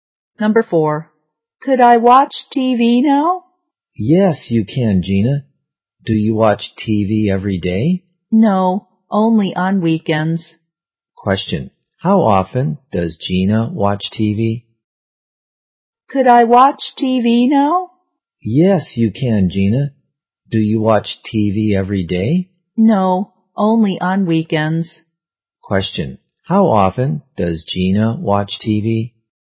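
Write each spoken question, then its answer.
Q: How often does Gina watch TV?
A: Only on weekends.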